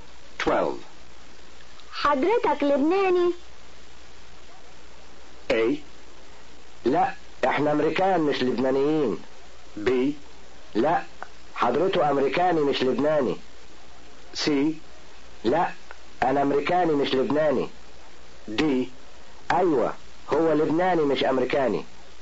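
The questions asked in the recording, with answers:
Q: حضرتك لبناني؟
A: C: لا انا امريكاني مش لبناني.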